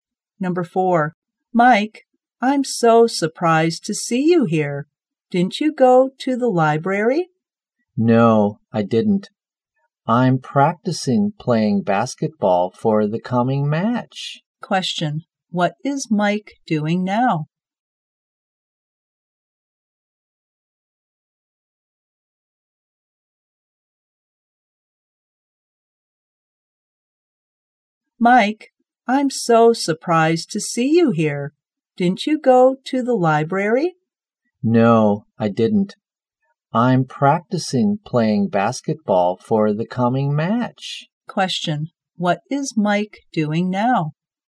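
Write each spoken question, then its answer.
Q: what is Mike doing now?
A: Practicing playing basketball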